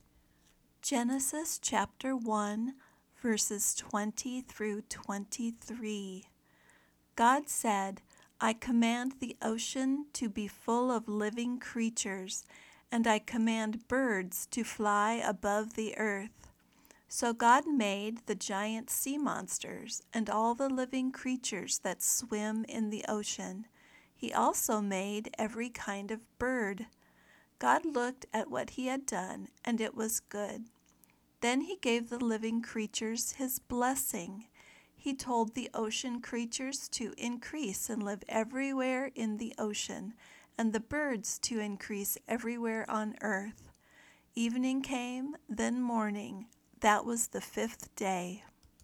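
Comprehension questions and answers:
Find the answers to these three questions as you listen:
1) What did God give to all the living creatures?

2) Where did God command the sea creatures to live?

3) Where did God command the birds to fly?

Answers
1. his blessing
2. everywhere in the ocean
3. above the earth

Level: Beginner Lesson 7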